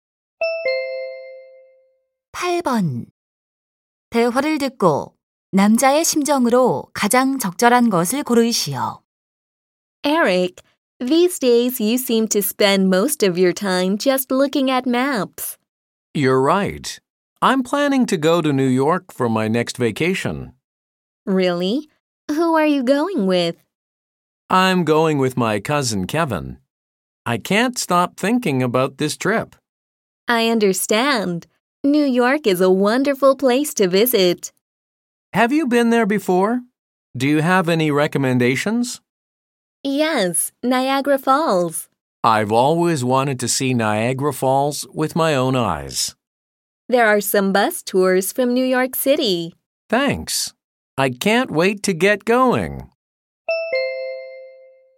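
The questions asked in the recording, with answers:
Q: 대화를 듣고 남자의 심정으로 가장 적절한 것을 고르시오.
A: 들뜬, 기대에 찬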